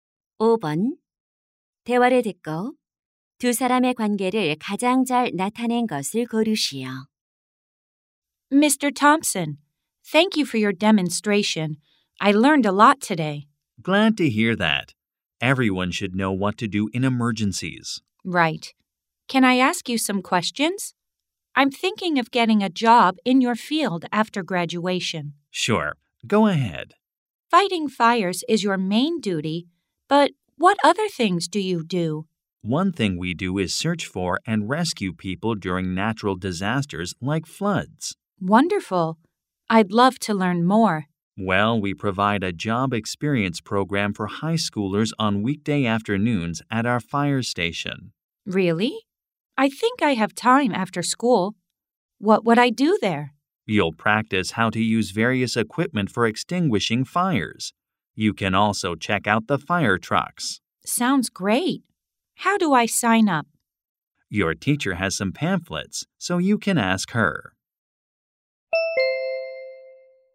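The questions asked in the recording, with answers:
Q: 대화를 듣고 두 사람의 관계를 가장 잘 나타낸 것을 고르시오.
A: 소방관 - 고등학생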